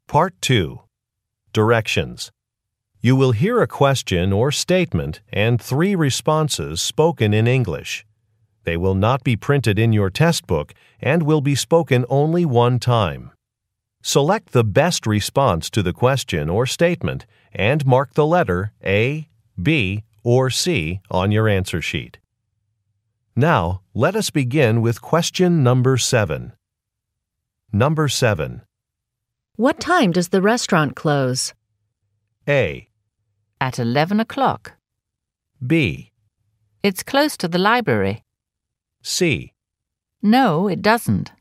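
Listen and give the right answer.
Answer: At 11 o'clock.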